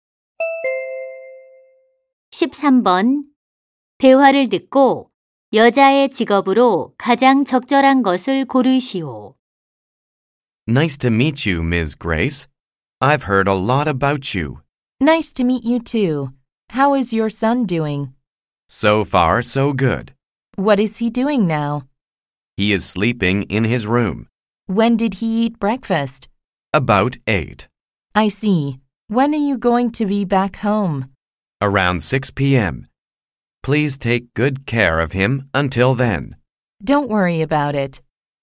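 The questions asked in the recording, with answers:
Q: 대화를 듣고 여자의 직업으로 가장 적절한 것을 고르시오.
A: 아이 돌보미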